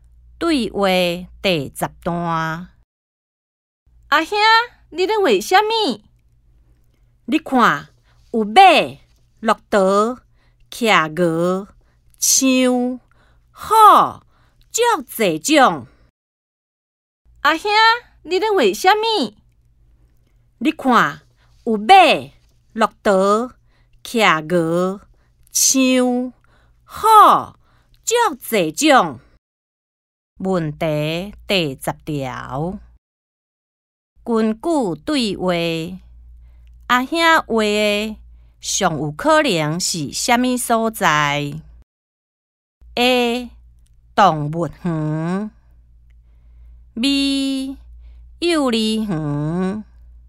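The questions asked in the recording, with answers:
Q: 根据对话,阿兄画的上有可能是什么所在?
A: A: 动物园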